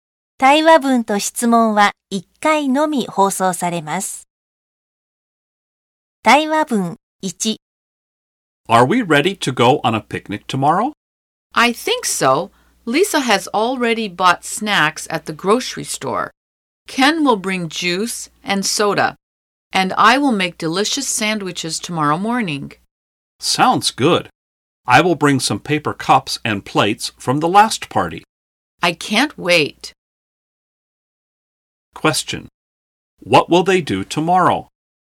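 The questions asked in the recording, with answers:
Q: What will they do tomorrow?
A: Go on a picnic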